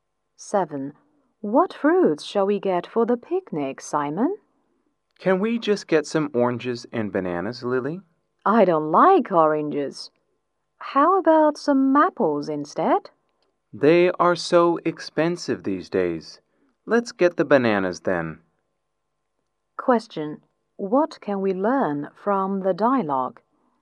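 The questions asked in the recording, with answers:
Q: What can we learn from the dialogue?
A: They will buy bananas for the picnic.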